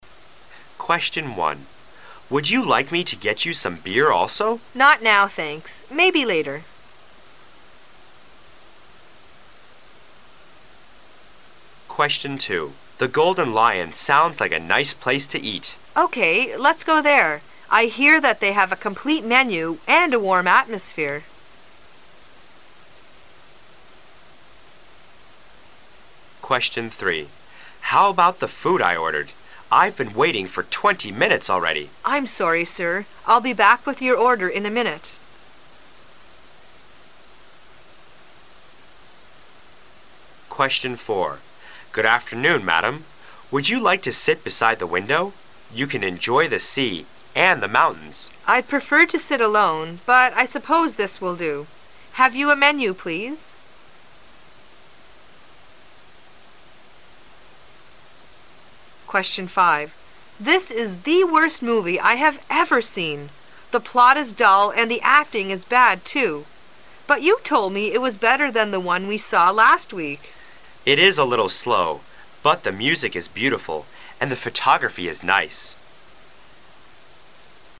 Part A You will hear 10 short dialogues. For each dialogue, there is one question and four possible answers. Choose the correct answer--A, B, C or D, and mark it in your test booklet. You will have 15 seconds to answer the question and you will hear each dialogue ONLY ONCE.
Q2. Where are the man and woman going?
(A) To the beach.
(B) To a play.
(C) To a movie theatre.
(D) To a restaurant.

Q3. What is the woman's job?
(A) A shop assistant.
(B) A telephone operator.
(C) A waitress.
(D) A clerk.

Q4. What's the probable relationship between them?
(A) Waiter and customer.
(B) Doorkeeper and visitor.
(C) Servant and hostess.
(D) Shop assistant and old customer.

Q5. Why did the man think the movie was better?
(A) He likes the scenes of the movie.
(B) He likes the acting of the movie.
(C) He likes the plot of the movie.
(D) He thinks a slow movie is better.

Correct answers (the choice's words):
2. To a restaurant.
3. A waitress.
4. Waiter and customer.
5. He likes the scenes of the movie.

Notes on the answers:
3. M: How about the food I ordered? I've been waiting for 20 minutes already. W: I'm sorry, Sir. I'11 be back with your order in a minute.

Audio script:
[解析] M: The Golden Lion sounds like a nice place to eat. W: OK, let's go there. I hear that they have a complete menu and a warm atmosphere.
[解析] M: How about the food I ordered? I've been waiting for 20 minutes already. W: I'm sorry, Sir. I'11 be back with your order in a minute.
A
[解析] M: Good afternoon, Madam, would you like to sit beside the window? You can enjoy the sea and the mountains. W: I'd prefer to sit alone, but I suppose this will do. Have you a menu, please?
A
[解析] W: This is the worst movie I have ever seen. The plot is dull and the acting is bad too. But you told me it was better than the one we saw last week. M: It is a little slow, but the music is beautiful and the photography is nice.
[解析] M: Mary, I'm sorry.